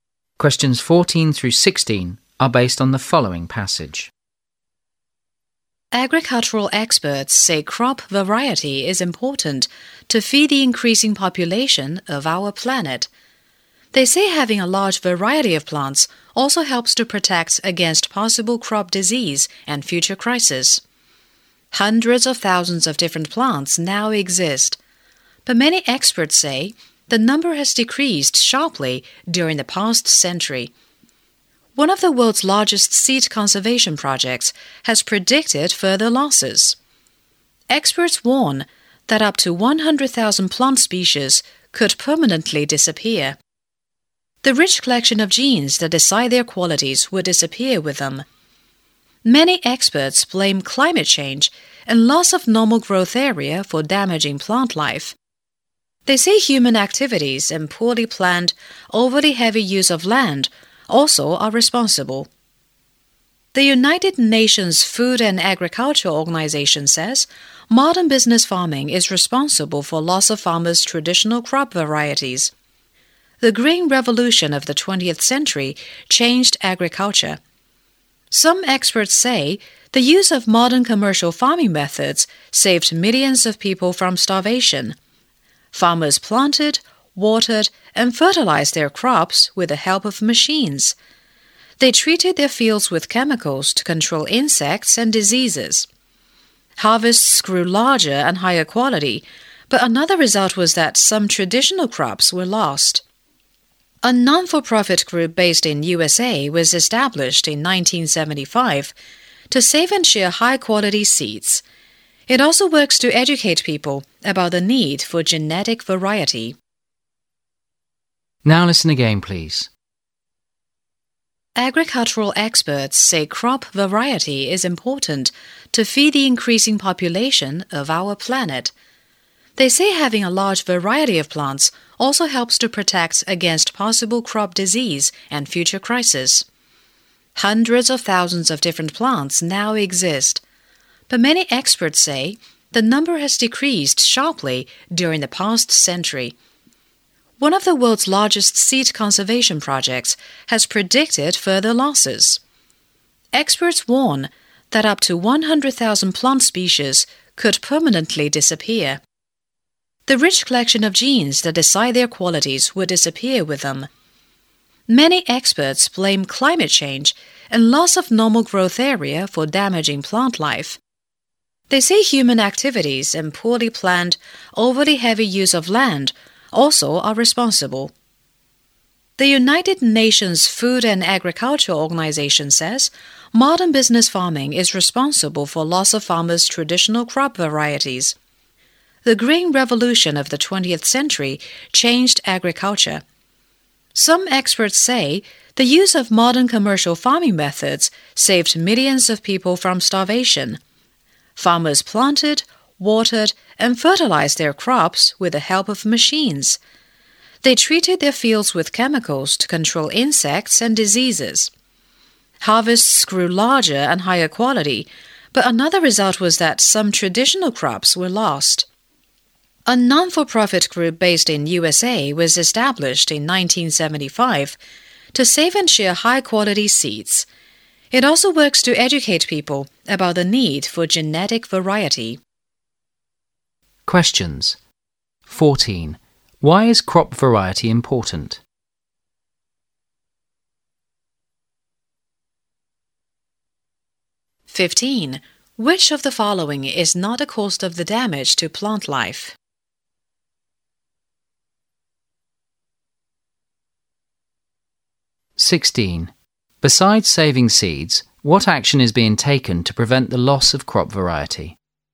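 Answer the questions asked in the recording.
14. To feed the growing population and protect against crop disease and future crises
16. Teaching people about the need for genetic variety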